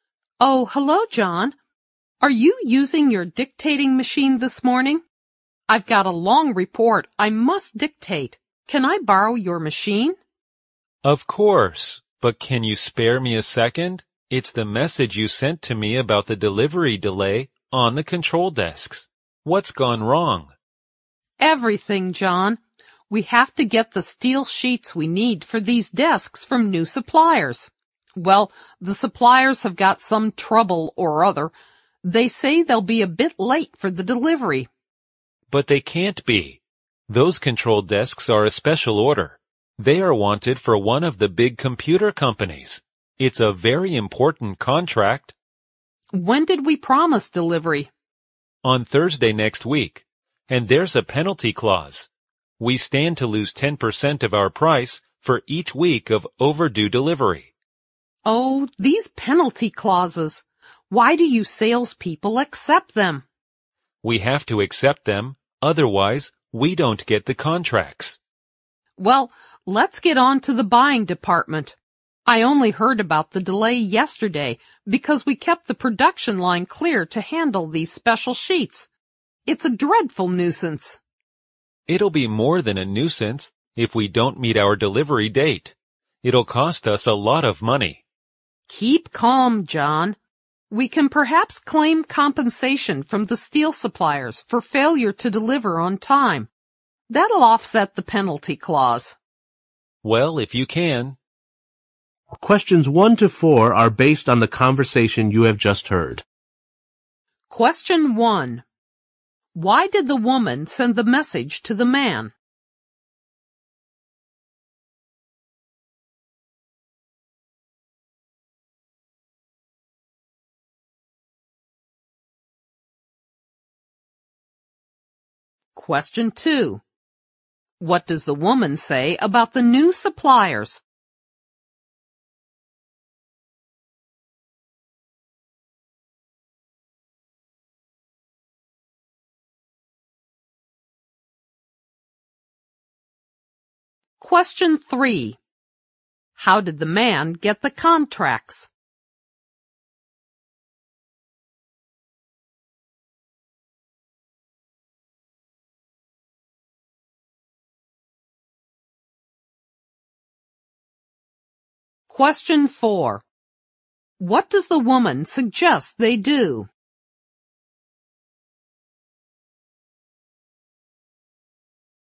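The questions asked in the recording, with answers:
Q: Why did the woman send the message to the man?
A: To tell him about the delivery delay on the control desks

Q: What does the woman say about the new suppliers?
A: They have some trouble and will be late with the delivery of steel sheets

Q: How did the man get the contracts?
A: By accepting penalty clauses

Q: What does the woman suggest they do?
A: Claim compensation from the steel suppliers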